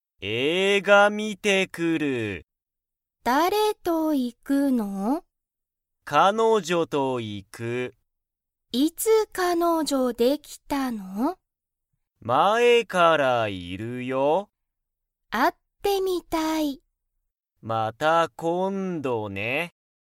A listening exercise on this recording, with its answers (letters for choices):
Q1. けんじは____と映画(えいが)に行(い)く。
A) ともこ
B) 彼女(かのじょ)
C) 友達(ともだち)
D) 先生(せんせい)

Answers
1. B

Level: Level 1